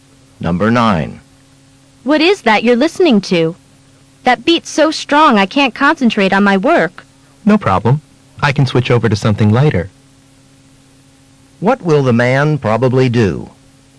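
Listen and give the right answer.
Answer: Switch to lighter music.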